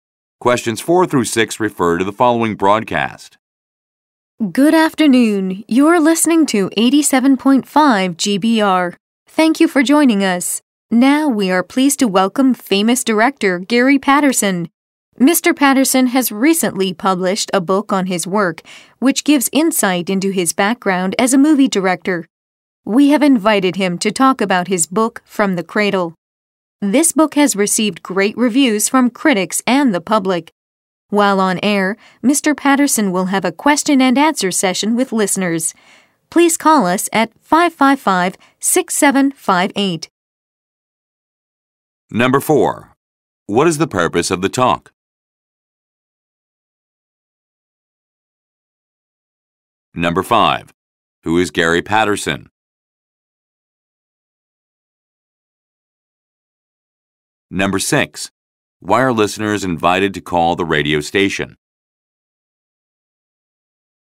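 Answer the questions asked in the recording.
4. To introduce a guest, director Gary Patterson, and his book
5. A famous movie director
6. To ask Mr. Patterson questions in a question and answer session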